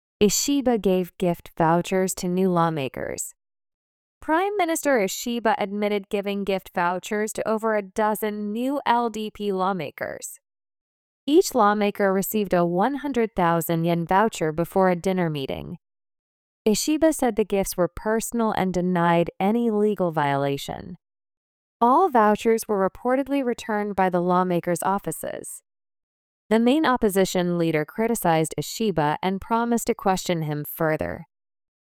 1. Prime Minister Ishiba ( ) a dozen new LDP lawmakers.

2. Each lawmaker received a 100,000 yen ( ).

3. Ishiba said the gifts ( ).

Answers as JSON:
{"1": "admitted giving gift vouchers to over", "2": "voucher before a dinner meeting", "3": "were personal and denied any legal violation"}

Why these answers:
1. 「voucher」は「商品券・引換券」という意味の名詞です。日本語では「バウチャー」というカタカナ(和製英語)が使われることもあります。
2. 英語ニュースの中で初めて登場する普通名詞は通常、不定冠詞です。 いきなり「その食事会」と限定しても、「どの食事会」なのか読み手(聞き手)はわからないからです。